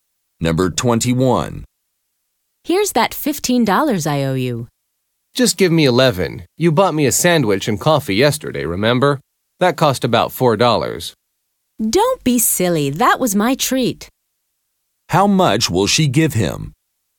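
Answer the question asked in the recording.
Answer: $15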